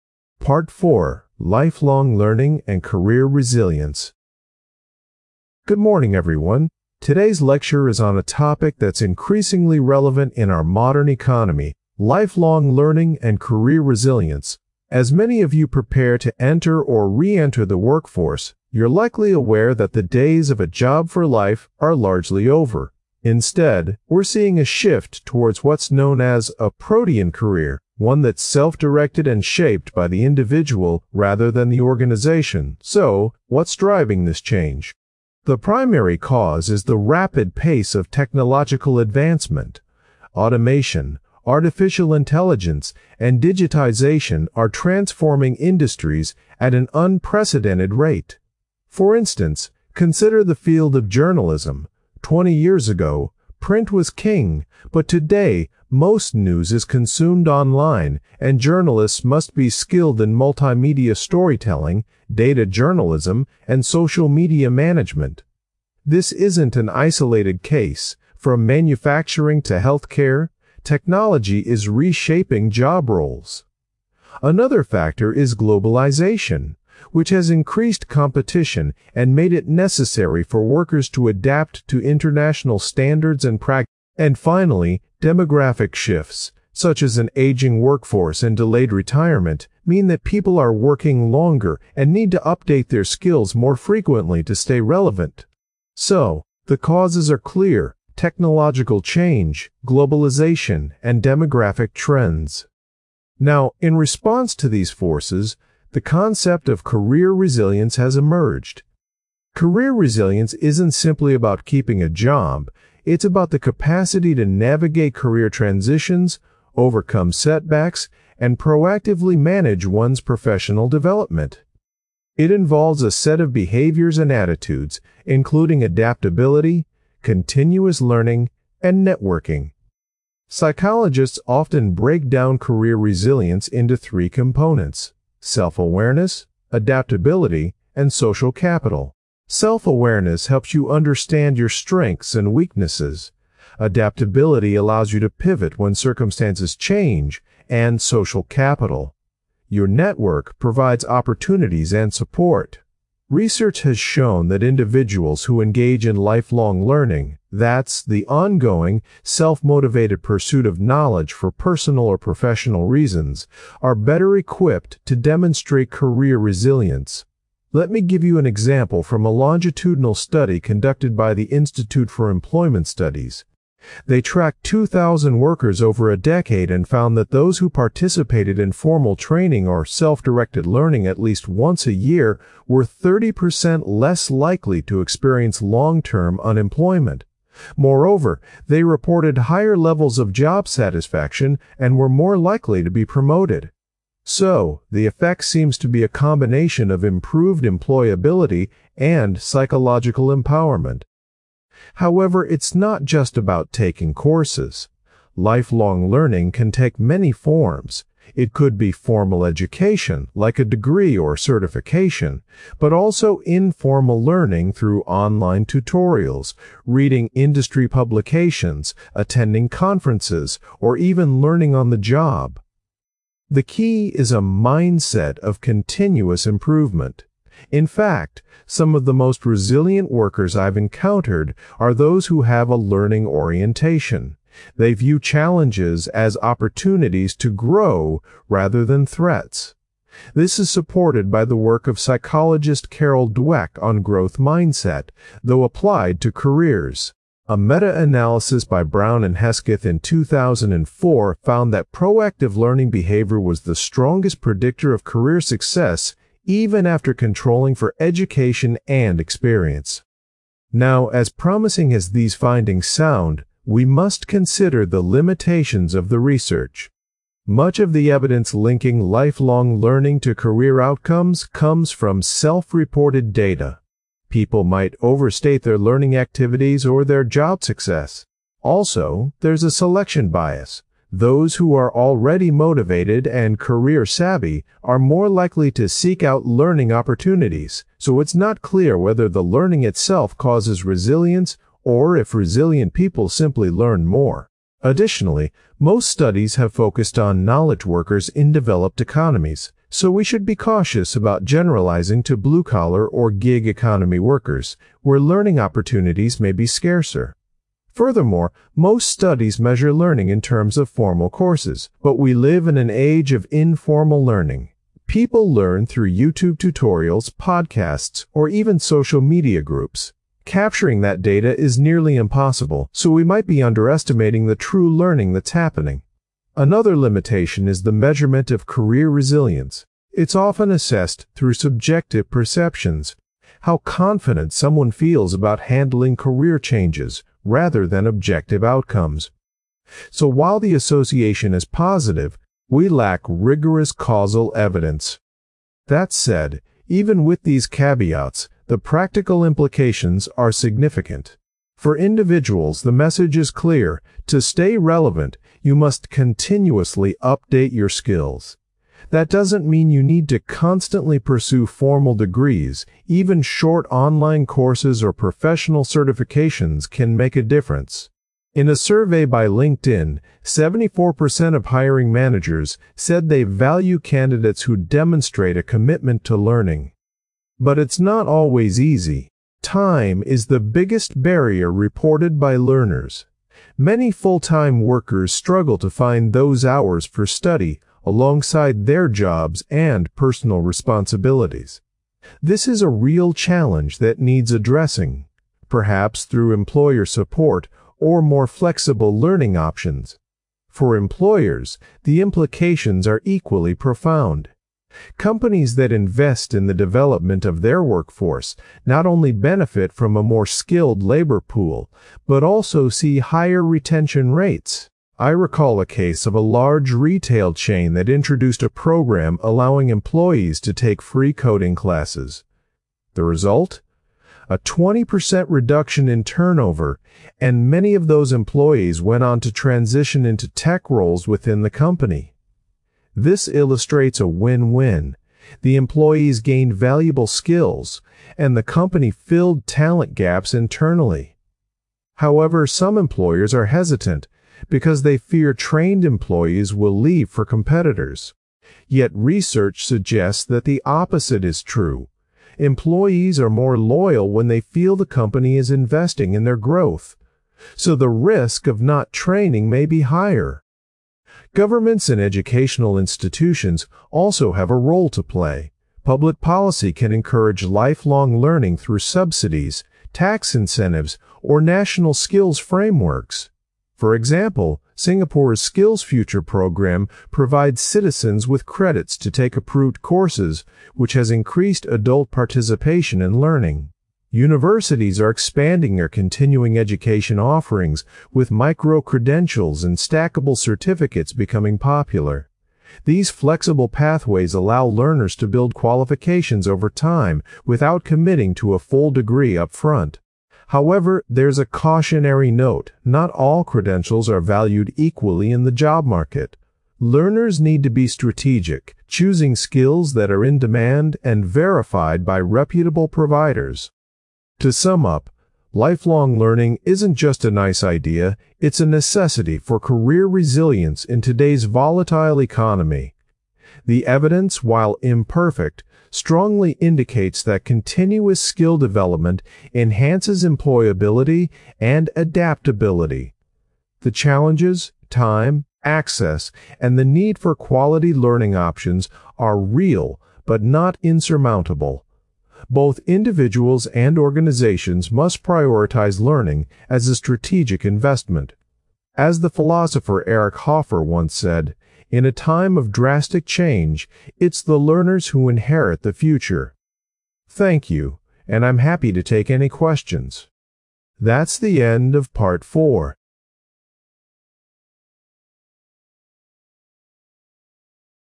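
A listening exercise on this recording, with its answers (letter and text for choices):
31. What does the lecturer identify as the primary cause of the need for lifelong learning?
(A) Globalisation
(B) Technological change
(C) Demographic shifts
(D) Government policies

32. Which industry does the lecturer use as an example of transformation?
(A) Manufacturing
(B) Retail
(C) Journalism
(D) Healthcare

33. What does the lecturer mean by career resilience?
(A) Staying in one job for life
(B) The ability to recover from setbacks and adapt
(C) Earning a high salary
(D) Managing a large team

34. According to the longitudinal study, what was a benefit of lifelong learning?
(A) Higher wages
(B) Greater job satisfaction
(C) Lower long-term unemployment risk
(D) Faster promotion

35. What limitation of the research does the lecturer mention?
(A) It only covers one country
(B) It relies on self-reported data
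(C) It uses only small samples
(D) It has no longitudinal studies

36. What is said about the measurement of career resilience?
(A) It is always objective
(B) It is often based on subjective assessments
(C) It uses financial indicators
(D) It is not important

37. What is the main barrier to lifelong learning for individuals?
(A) Lack of funding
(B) Lack of time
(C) Lack of interest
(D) Lack of employer support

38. What example does the lecturer give of a successful employer programme?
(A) A university free course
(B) A government skills credit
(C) A retail chain's coding classes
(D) A tech company's apprenticeship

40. What is the overall implication for individuals?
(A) Specialise in one area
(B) Continuously update their skills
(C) Avoid career changes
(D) Rely only on formal education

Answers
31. (B) Technological change
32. (C) Journalism
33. (B) The ability to recover from setbacks and adapt
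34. (C) Lower long-term unemployment risk
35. (B) It relies on self-reported data
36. (B) It is often based on subjective assessments
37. (B) Lack of time
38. (C) A retail chain's coding classes
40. (B) Continuously update their skills

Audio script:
Part 4: Lifelong Learning and Career Resilience
Lecturer: Good morning, everyone. Today's lecture is on a topic that's increasingly relevant in our modern economy: lifelong learning and career resilience. As many of you prepare to enter or re-enter the workforce, you're likely aware that the days of a 'job for life' are largely over. Instead, we're seeing a shift towards what's known as a 'protean career' - one that is self-directed and shaped by the individual rather than the organisation. So, what's driving this change? The primary cause is the rapid pace of technological advancement. Automation, artificial intelligence, and digitisation are transforming industries at an unprecedented rate. 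For instance, consider the field of journalism: twenty years ago, print was king, but today, most news is consumed online, and journalists must be skilled in multimedia storytelling, data journalism, and social media management. This isn't an isolated case; from manufacturing to healthcare, technology is reshaping job roles. Another factor is globalisation, which has increased competition and made it necessary for workers to adapt to international standards and practices. And finally, demographic shifts, such as an aging workforce and delayed retirement, mean that people are working longer and need to update their skills more frequently to stay relevant. So, the causes are clear: technological change, globalisation, and demographic trends.
Lecturer: Now, in response to these forces, the concept of career resilience has emerged. Career resilience isn't simply about keeping a job; it's about the capacity to navigate career transitions, overcome setbacks, and proactively manage one's professional development. 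It involves a set of behaviours and attitudes, including adaptability, continuous learning, and networking. Psychologists often break down career resilience into three components: self-awareness, adaptability, and social capital. Self-awareness helps you understand your strengths and weaknesses; adaptability allows you to pivot when circumstances change; and social capital-your network-provides opportunities and support. Research has shown that individuals who engage in lifelong learning - that is, the ongoing, self-motivated pursuit of knowledge for personal or professional reasons - are better equipped to demonstrate career resilience. Let me give you an example from a longitudinal study conducted by the Institute for Employment Studies. They tracked 2,000 workers over a decade and found that those who participated in formal training or self-directed learning at least once a year were 30% less likely to experience long-term unemployment. 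Moreover, they reported higher levels of job satisfaction and were more likely to be promoted. So, the effect seems to be a combination of improved employability and psychological empowerment.
Lecturer: However, it's not just about taking courses. Lifelong learning can take many forms: it could be formal education, like a degree or certification, but also informal learning through online tutorials, reading industry publications, attending conferences, or even learning on the job. The key is a mindset of continuous improvement. In fact, some of the most resilient workers I've encountered are those who have a 'learning orientation' - they view challenges as opportunities to grow rather than threats. This is supported by the work of psychologist Carol Dweck on growth mindset, though applied to careers. A meta-analysis by Brown and Hesketh in 2004 found that proactive learning behaviour was the strongest predictor of career success, even after controlling for education and experience.
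Lecturer: Now, as promising as these findings sound, we must consider the limitations of the research. Much of the evidence linking lifelong learning to career outcomes comes from self-reported data. People might overstate their learning activities or their job success. Also, there's a selection bias: those who are already motivated and career-savvy are more likely to seek out learning opportunities, so it's not clear whether the learning itself causes resilience or if resilient people simply learn more. Additionally, most studies have focused on knowledge workers in developed economies, so we should be cautious about generalising to blue-collar or gig economy workers, where learning opportunities may be scarcer. Furthermore, most studies measure learning in terms of formal courses, but we live in an age of informal learning. People learn through YouTube tutorials, podcasts, or even social media groups. 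Capturing that data is nearly impossible, so we might be underestimating the true learning that's happening. Another limitation is the measurement of career resilience. It's often assessed through subjective perceptions - how confident someone feels about handling career changes - rather than objective outcomes. So while the association is positive, we lack rigorous causal evidence.
Lecturer: That said, even with these caveats, the practical implications are significant. For individuals, the message is clear: to stay relevant, you must continuously update your skills. That doesn't mean you need to constantly pursue formal degrees; even short online courses or professional certifications can make a difference. In a survey by LinkedIn, 74% of hiring managers said they value candidates who demonstrate a commitment to learning. But it's not always easy. Time is the biggest barrier reported by learners. 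Many full-time workers struggle to find those hours for study alongside their jobs and personal responsibilities. This is a real challenge that needs addressing-perhaps through employer support or more flexible learning options. For employers, the implications are equally profound. Companies that invest in the development of their workforce not only benefit from a more skilled labour pool but also see higher retention rates. I recall a case of a large retail chain that introduced a programme allowing employees to take free coding classes. The result? A 20% reduction in turnover, and many of those employees went on to transition into tech roles within the company. This illustrates a win-win: the employees gained valuable skills, and the company filled talent gaps internally. However, some employers are hesitant because they fear trained employees will leave for competitors. Yet research suggests that the opposite is true: employees are more loyal when they feel the company is investing in their growth. 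So the risk of not training may be higher.
Lecturer: Governments and educational institutions also have a role to play. Public policy can encourage lifelong learning through subsidies, tax incentives, or national skills frameworks. For example, Singapore's SkillsFuture programme provides citizens with credits to take approved courses, which has increased adult participation in learning. Universities are expanding their continuing education offerings, with micro-credentials and stackable certificates becoming popular. These flexible pathways allow learners to build qualifications over time without committing to a full degree upfront. However, there's a cautionary note: not all credentials are valued equally in the job market. Learners need to be strategic, choosing skills that are in demand and verified by reputable providers.
Lecturer: To sum up, lifelong learning is not just a nice idea; it's a necessity for career resilience in today's volatile economy. 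The evidence, while imperfect, strongly indicates that continuous skill development enhances employability and adaptability. The challenges-time, access, and the need for quality learning options-are real but not insurmountable. Both individuals and organizations must prioritise learning as a strategic investment. As the philosopher Eric Hoffer once said, 'In a time of drastic change, it is the learners who inherit the future.' Thank you, and I'm happy to take any questions.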